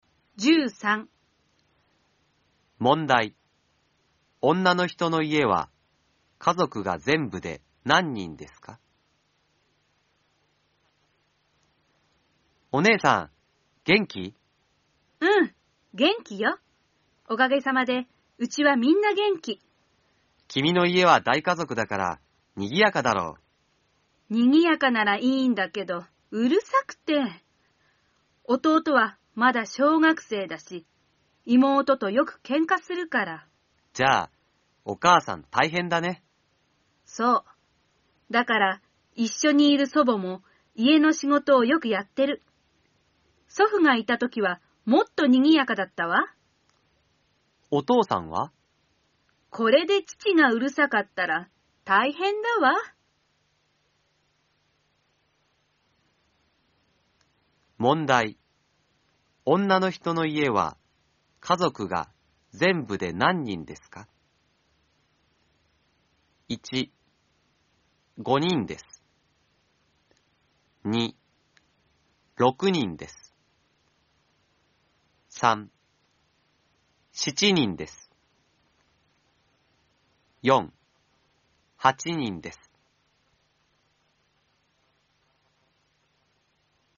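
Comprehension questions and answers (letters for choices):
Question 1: 女の人の家は、家族がぜんぶで何人ですか。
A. 5人です。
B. 6人です。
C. 7人です。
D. 8人です。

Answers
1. C

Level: N4 ĐỀ 2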